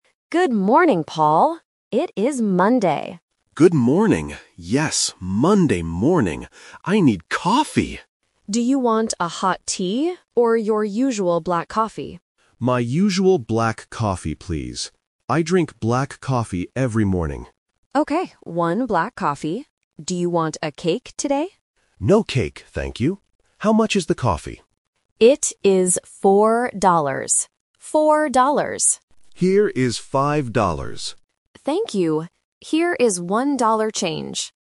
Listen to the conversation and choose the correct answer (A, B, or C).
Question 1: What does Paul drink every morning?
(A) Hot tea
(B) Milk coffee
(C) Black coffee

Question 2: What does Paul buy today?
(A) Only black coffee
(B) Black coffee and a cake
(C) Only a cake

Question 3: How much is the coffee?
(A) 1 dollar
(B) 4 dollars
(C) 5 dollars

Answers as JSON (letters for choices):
{"1": "C", "2": "A", "3": "B"}

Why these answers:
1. The Key: Paul explicitly says, "I drink black coffee every morning." The Trap (A): "Hot tea" is mentioned by the barista as a question ("Do you want a hot tea?"), but Paul chooses his usual coffee. (B) is a plausible morning drink but is not mentioned in the audio.
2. The Key: The barista asks if he wants a cake, and Paul says, "No cake, thank you." Therefore, he only buys coffee. The Trap (B & C): "Cake" is mentioned in the conversation, making these options tempting, but Paul rejects the cake.
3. The Key: Paul asks for the price, and the barista answers clearly: "It is 4 dollars." The Trap (A & C): 5 dollars is the money Paul gives to the barista, and 1 dollar is the change (tiền thừa). Both numbers are mentioned to confuse the listener.